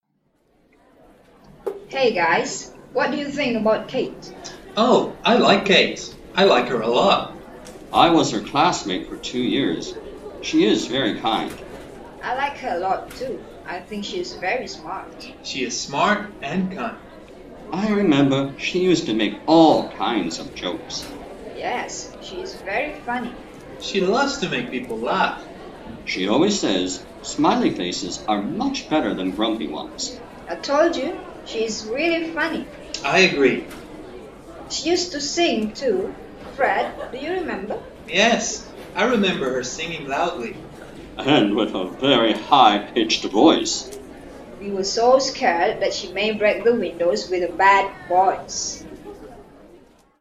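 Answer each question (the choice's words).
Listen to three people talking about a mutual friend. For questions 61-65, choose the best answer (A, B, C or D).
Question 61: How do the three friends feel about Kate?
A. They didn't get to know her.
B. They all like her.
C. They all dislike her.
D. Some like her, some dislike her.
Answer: They all like her.

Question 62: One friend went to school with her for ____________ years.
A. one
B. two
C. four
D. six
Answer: two

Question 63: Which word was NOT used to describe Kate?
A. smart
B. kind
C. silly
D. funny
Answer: silly

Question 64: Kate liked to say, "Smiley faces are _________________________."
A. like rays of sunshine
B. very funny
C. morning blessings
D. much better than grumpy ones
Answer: much better than grumpy ones

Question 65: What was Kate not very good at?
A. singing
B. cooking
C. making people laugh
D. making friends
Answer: singing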